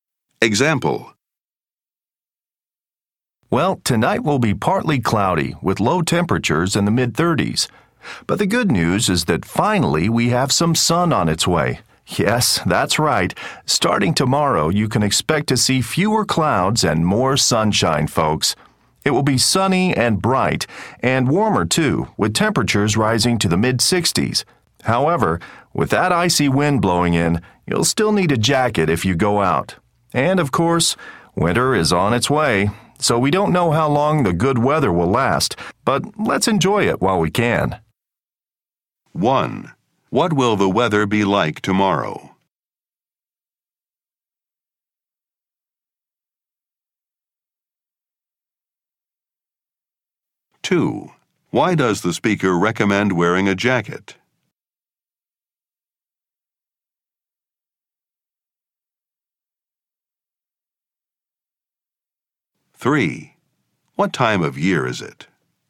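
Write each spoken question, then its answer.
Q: What will the weather be like tomorrow?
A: Sunny, bright and warmer

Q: Why does the speaker recommend wearing a jacket?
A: Because an icy wind will be blowing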